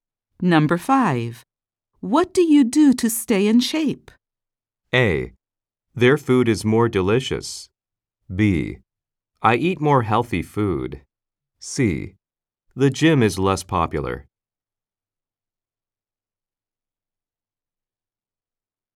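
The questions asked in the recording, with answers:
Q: What do you do to stay in shape?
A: B: I eat more healthy food.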